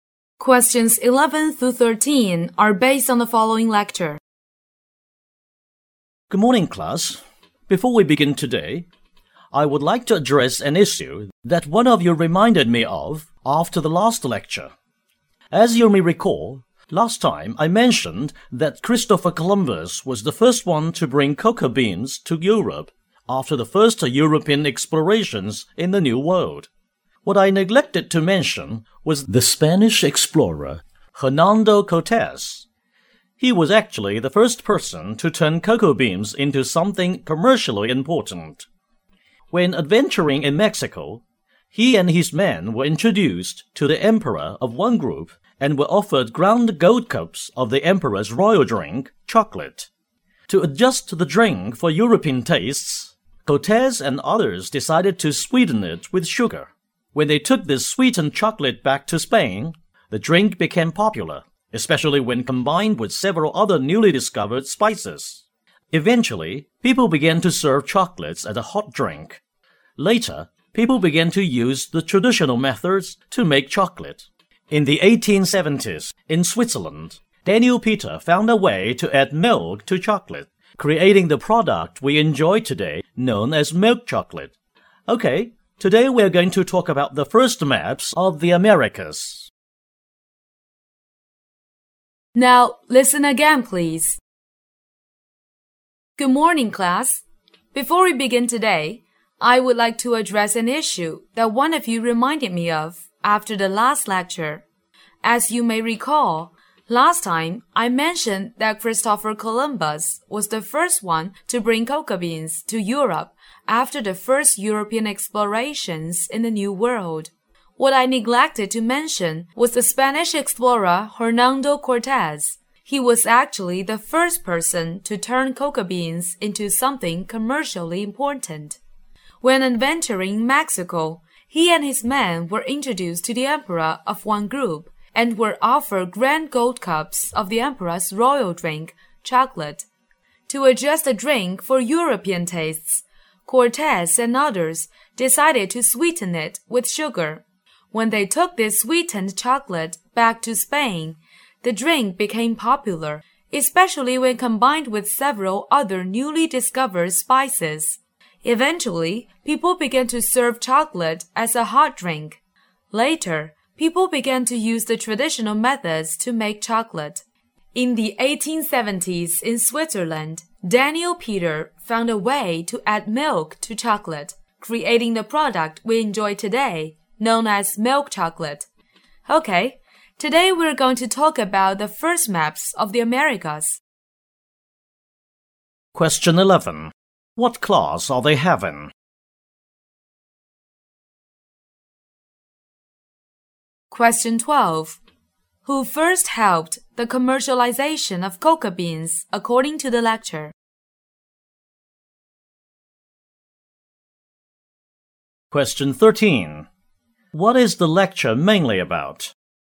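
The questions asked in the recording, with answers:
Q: Who first helped the commercialization of cocoa beans according to the lecture?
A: Hernando Cortes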